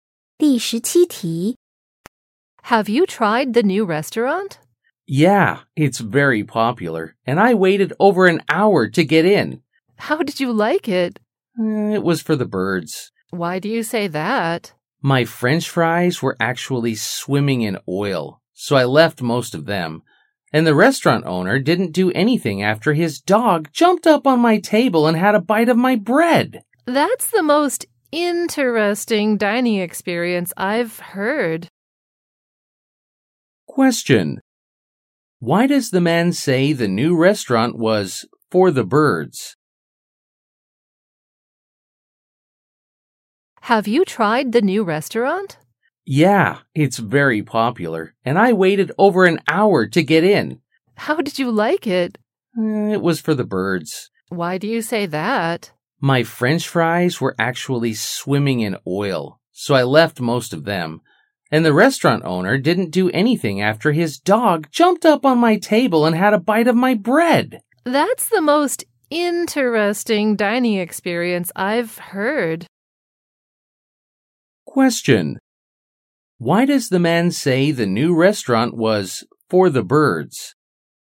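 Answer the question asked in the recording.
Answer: The food was oily and the owner let his dog eat from his table; it was terrible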